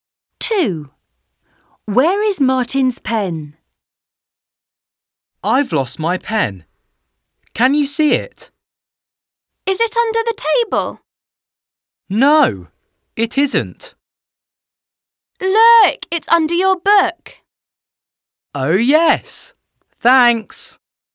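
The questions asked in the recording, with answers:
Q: Where is Martin's pen?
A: under his book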